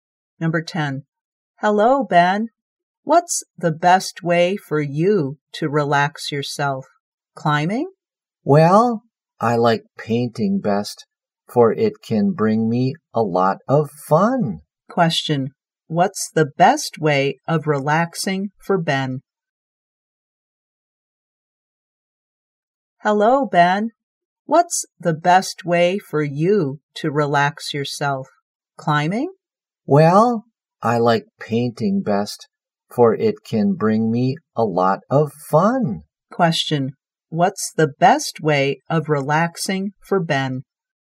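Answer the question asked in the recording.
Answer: Painting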